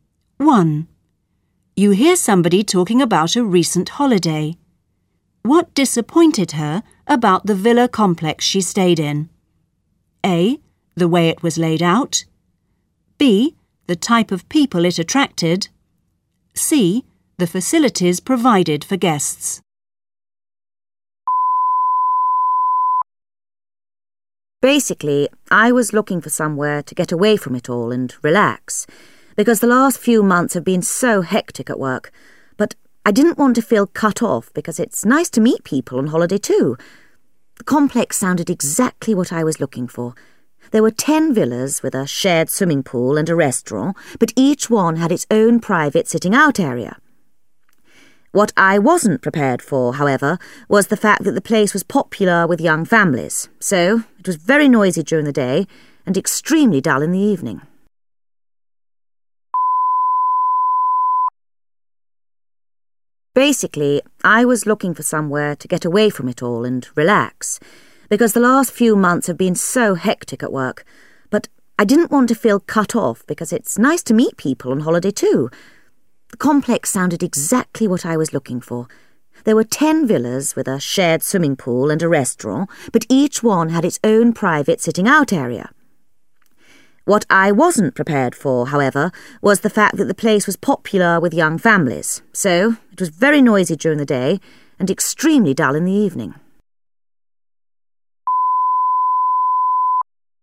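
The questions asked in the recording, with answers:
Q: What disappointed her about the villa complex she stayed in?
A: B: The type of people it attracted.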